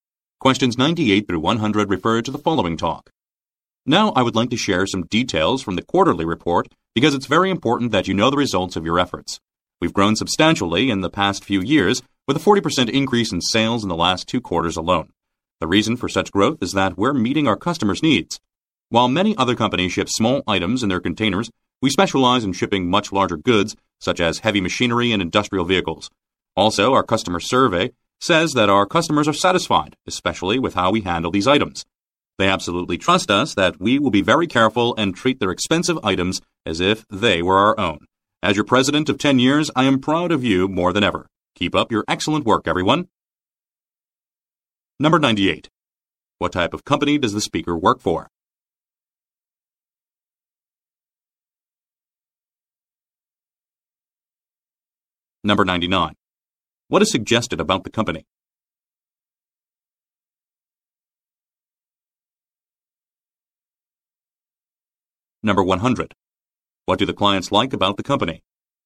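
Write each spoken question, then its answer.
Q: What type of company does the speaker work for?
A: A shipping company for large goods

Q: What do the clients like about the company?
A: It handles their items carefully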